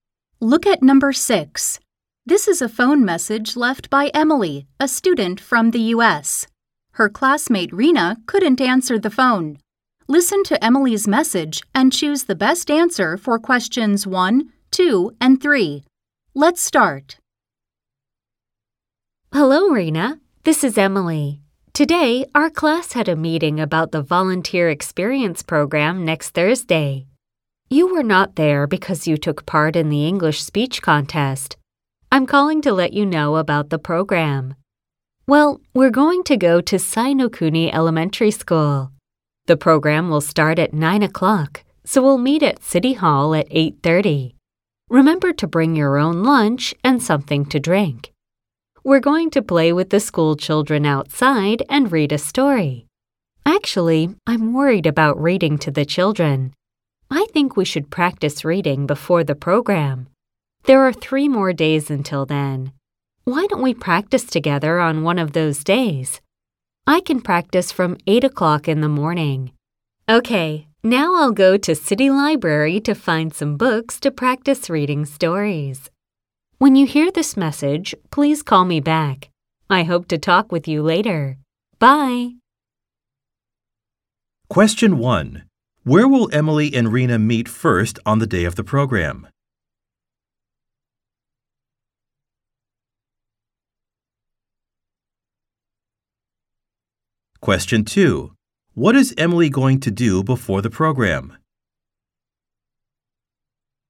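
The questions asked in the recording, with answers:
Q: Where will Emily and Rena meet first on the day of the program?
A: At City Hall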